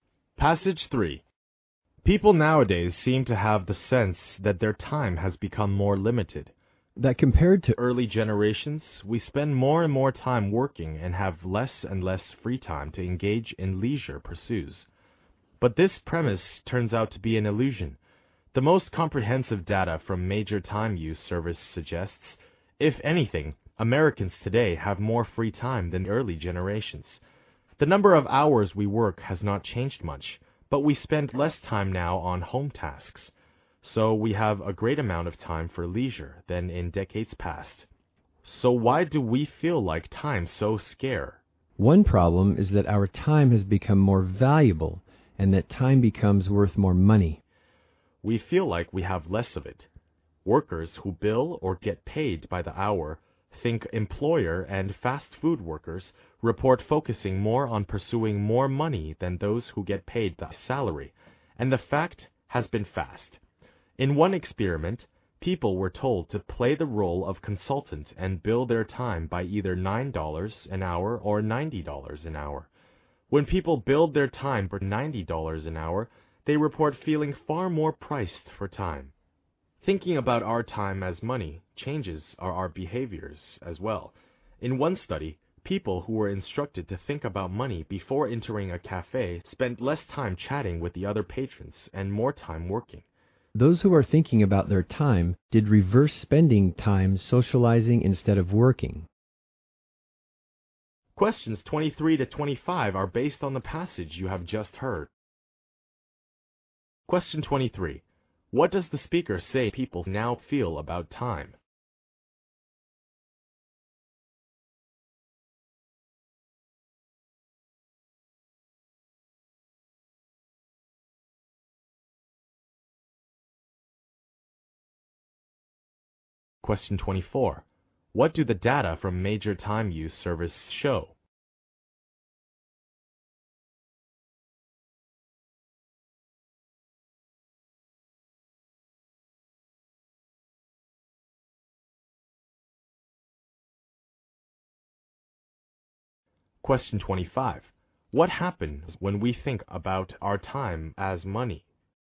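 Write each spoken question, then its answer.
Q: What does the speaker say people now feel about time?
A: They feel they have less free time.

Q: What do the data from major time use service show?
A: Americans today have more free time than earlier generations.

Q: What happens when we think about our time as money?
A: We feel more pressed for time and spend more time working.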